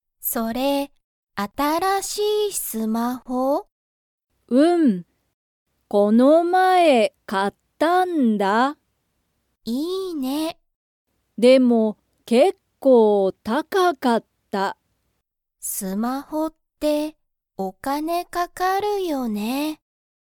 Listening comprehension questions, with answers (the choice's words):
ゆかのスマホは、結構(けっこう)____。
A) 高(たか)かった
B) 安(やす)かった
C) かわいかった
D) よかった)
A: 高(たか)かった

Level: Level 1